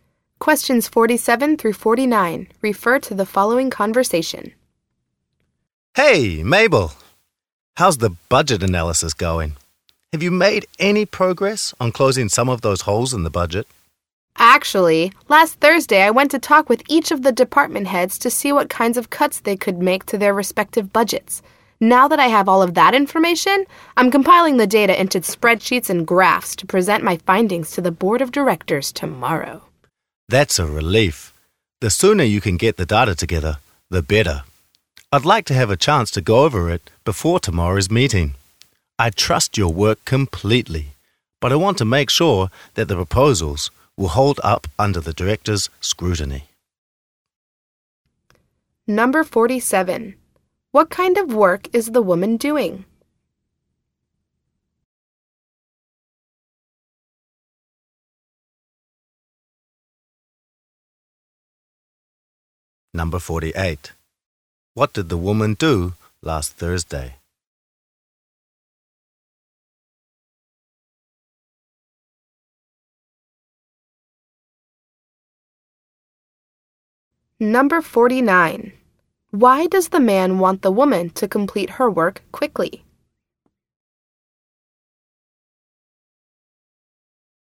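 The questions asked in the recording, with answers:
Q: What kind of work is the woman doing?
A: A budget analysis

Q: What did the woman do last Thursday?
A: Talked with each of the department heads

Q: Why does the man want the woman to complete her work quickly?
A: He wants to review it before tomorrow's meeting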